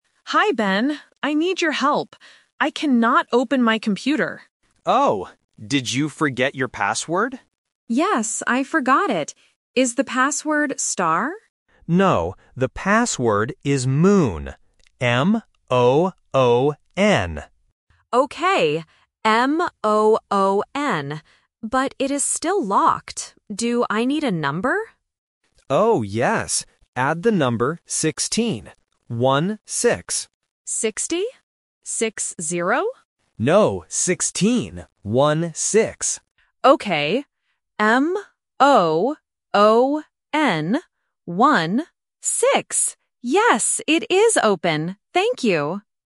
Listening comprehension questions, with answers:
Listen to the conversation and choose the correct answer (A, B, or C).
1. What is Anna's problem?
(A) She broke her computer.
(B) She forgot her phone.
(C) She forgot her password.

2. What is the word in the password?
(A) S-T-A-R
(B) M-O-O-N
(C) N-O-O-N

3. What number does Anna need to add?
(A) 6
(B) 16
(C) 60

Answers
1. (C) She forgot her password.
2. (B) M-O-O-N
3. (B) 16

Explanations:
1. The correct answer is C. Ben asks, "Did you forget your password?" and Anna replies, "Yes, I forgot it." Option A (She broke her computer) and Option B (She forgot her phone) are plausible tech problems, but they are not mentioned in the audio.
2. The correct answer is B. Ben clearly spells the word: "M-O-O-N". Option A (S-T-A-R) is the trap because Anna asks, "Is the password star?", but Ben says "No". Option C (N-O-O-N) is a trap because the letters "M" and "N" sound similar.
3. The correct answer is B. Ben tells Anna to add the number "16. One-six." Option C (60) is the trap because Anna mishears and asks "60? Six-zero?", testing the listener's ability to distinguish between "sixteen" and "sixty". Option A (6) is just a plausible wrong number.

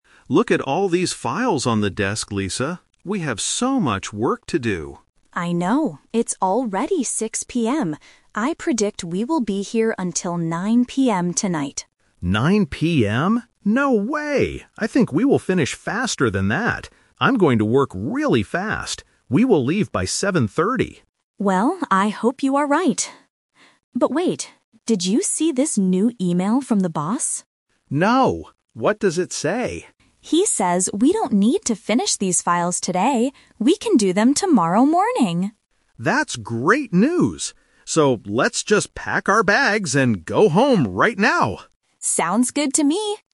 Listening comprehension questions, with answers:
Listen to the conversation between two coworkers. Choose the correct answer (A, B, or C).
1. What time does Lisa predict they will finish the work?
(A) 6:00 PM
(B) 7:30 PM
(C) 9:00 PM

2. Why does Mark think they will leave at 7:30 PM?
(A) Because he is going to work very fast.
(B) Because he has a meeting with the boss.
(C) Because there are only a few files left.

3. Why do they decide to go home early at the end?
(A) They finished all the work very quickly.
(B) They got an email saying they can finish it tomorrow.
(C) They are too tired to work anymore.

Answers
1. (C) 9:00 PM
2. (A) Because he is going to work very fast.
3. (B) They got an email saying they can finish it tomorrow.

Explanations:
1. Lisa clearly says, "I predict we will be here until 9:00 PM tonight." Trap: Option (A) is a trap because 6:00 PM is the current time, not the predicted time. Option (B) is a "Person Trap" because 7:30 PM is Mark's prediction, not Lisa's.
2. Mark says, "I think we will finish faster than that. I'm going to work really fast." Trap: Option (B) is not mentioned in the audio (the boss only sends an email later). Option (C) is incorrect because Mark explicitly says "Look at all these files" at the beginning, meaning there are a lot of files, not just a few.
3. Option (A) is the "Twist" trap. They planned to work hard to finish, but they didn't actually finish the files; they just stopped working. Option (C) is a plausible reason in real life, but it is not the reason mentioned in the conversation.

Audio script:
Mark: Look at all these files on the desk, Lisa. We have so much work to do.
Lisa: I know. I predict we will be here until 9:00 PM tonight.
No way. I think we will finish faster than that. I'm going to work really fast. We will leave by 7:30.
Lisa: Well, I hope you are right. But wait... did you see this new email from the boss?
Mark: No, what does it say?
Lisa: He says we don't need to finish these files today. We can do them tomorrow morning!
Mark: That's great news! So, let's just pack our bags and go home right now.

